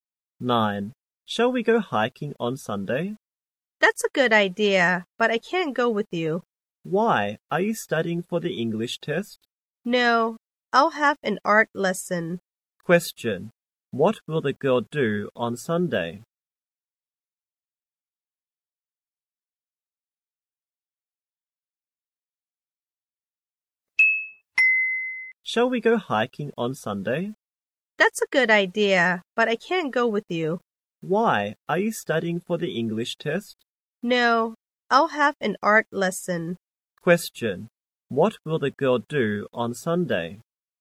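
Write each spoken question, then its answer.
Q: What will the girl do on Sunday?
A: Have an art lesson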